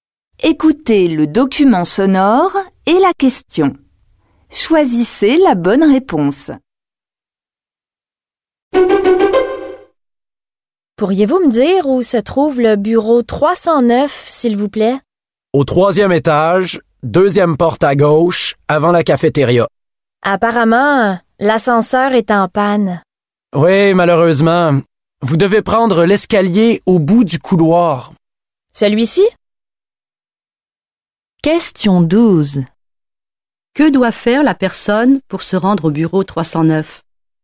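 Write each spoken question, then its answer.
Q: Que doit faire la personne pour se rendre au bureau 309?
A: Prendre l'escalier au bout du couloir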